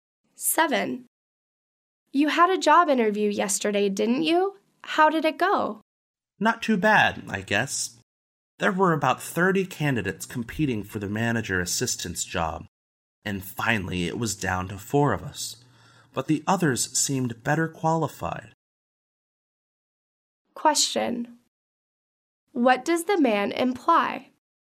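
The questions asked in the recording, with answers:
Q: What does the man imply?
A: He doesn't think he will get the job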